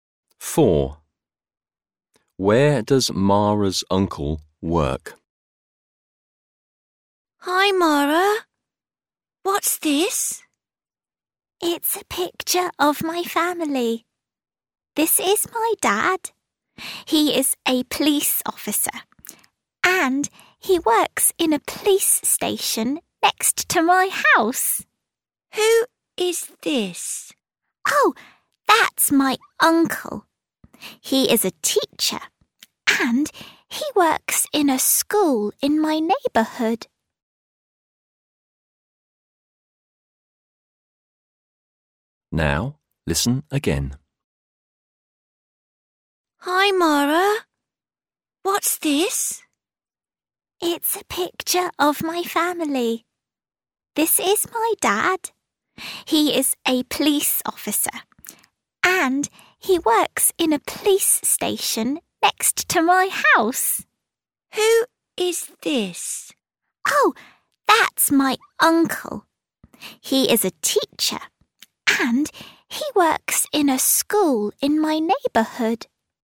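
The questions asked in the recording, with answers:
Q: Where does Mara's uncle work?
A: In a school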